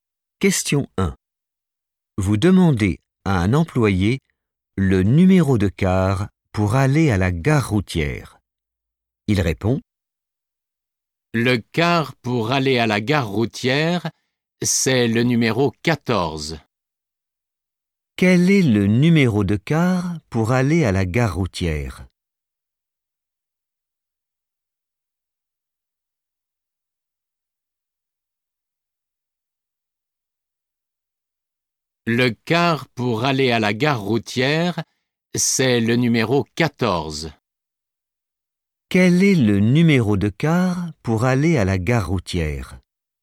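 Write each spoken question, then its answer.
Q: Quel est le numéro de car pour aller à la gare routière?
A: 14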